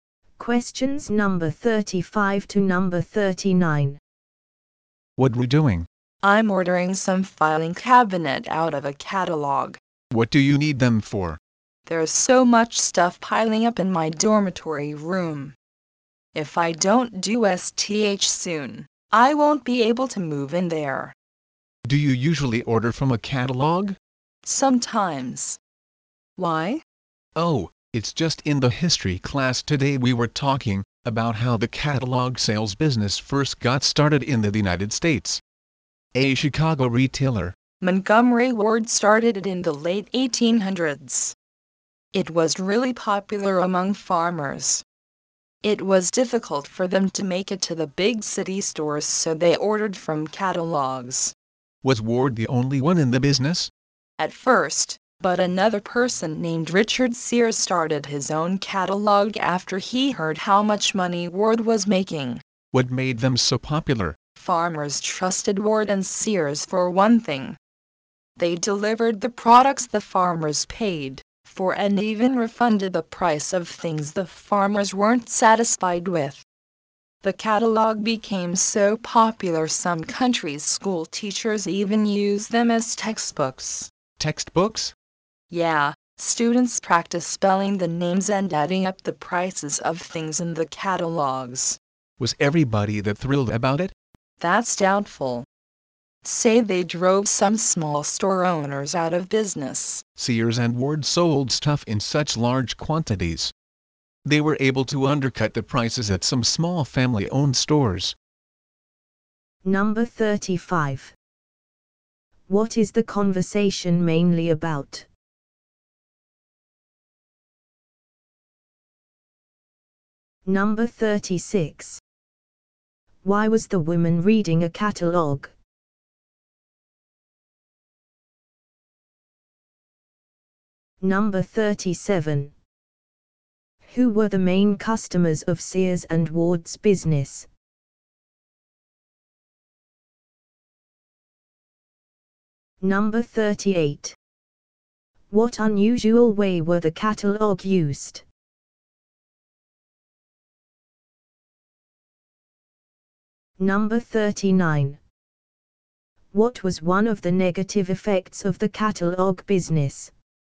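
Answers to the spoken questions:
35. How the catalog sales business began in the United States
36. To order filing cabinets for her crowded dorm room
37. Farmers
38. As textbooks in schools
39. It drove some small stores out of business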